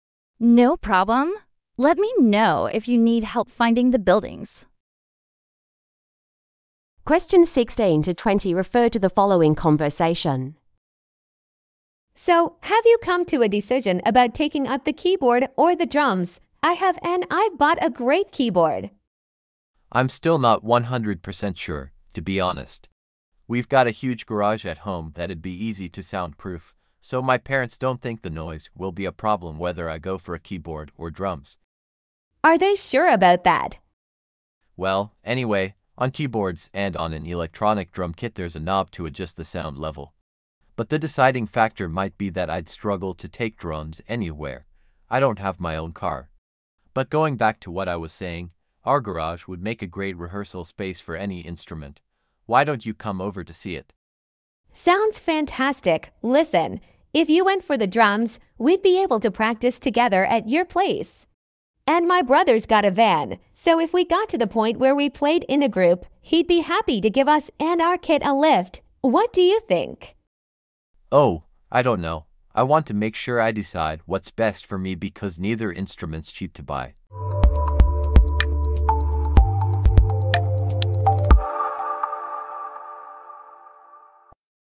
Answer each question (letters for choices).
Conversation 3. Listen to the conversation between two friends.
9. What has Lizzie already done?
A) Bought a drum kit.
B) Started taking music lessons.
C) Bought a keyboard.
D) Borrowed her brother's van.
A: C

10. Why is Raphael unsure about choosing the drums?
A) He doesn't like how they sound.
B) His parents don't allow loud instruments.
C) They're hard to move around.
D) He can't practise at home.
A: C

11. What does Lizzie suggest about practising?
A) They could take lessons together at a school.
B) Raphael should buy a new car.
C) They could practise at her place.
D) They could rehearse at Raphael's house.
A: D

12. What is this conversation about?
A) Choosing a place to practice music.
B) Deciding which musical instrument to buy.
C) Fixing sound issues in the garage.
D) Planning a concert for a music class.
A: B

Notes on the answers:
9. I have and I've bought a great keyboard! (Tôi đã mua một chiếc đàn keyboard tuyệt vời!)
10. But the deciding factor might be that I'd struggle to take drums anywhere. I don't have my own car. (Nhưng yếu tố quyết định có thể là việc tôi khó mang trống đi bất cứ đâu. Tôi không có xe riêng.)
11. if you went for the drums, we'd be able to practise together at your place. (nếu bạn chọn chơi trống, chúng ta có thể tập luyện cùng nhau tại nhà bạn.)

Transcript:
Lizzie: So, have you come to a decision about taking up the keyboard or the drums? I have and I've bought a great keyboard!
Raphael: I'm still not 100% sure, to be honest. We've got a huge garage at home that'd be easy to soundproof, so my parents don't think the noise will be a problem whether I go for a keyboard or drums.
Lizzie: Are they sure about that?
Raphael: Well, anyway, on keyboards and on an electronic drum kit there's a knob to adjust the sound level. But the deciding factor might be that I'd struggle to take drums anywhere. I don't have my own car. But going back to what I was saying, our garage would make a great rehearsal space for any instrument. Why don't you come over to see it?
Lizzie: Sounds fantastic! Listen, if you went for the drums, we'd be able to practise together at your place. And my brother's got a van, so if we got to the point where we played in a group, he'd be happy to give us and our kit a lift. What do you think?
Raphael: Oh, I don't know. I want to make sure I decide what's best for me because neither instrument's cheap to buy.